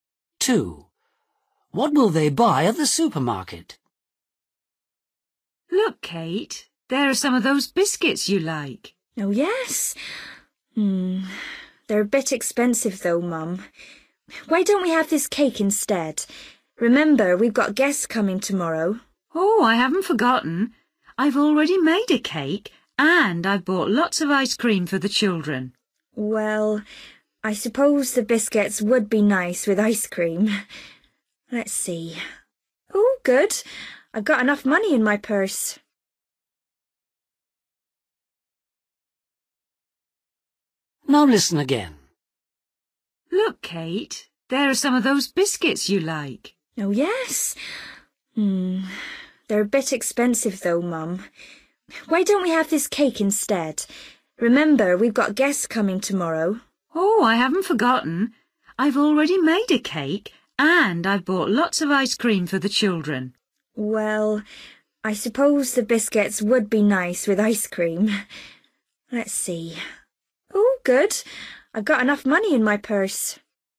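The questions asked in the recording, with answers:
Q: What will they buy at the supermarket?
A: Biscuits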